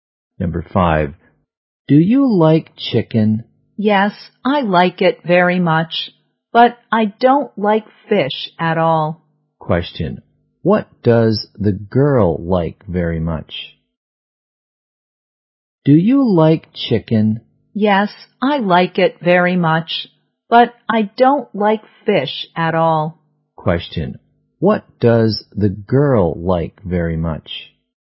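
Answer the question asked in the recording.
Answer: Chicken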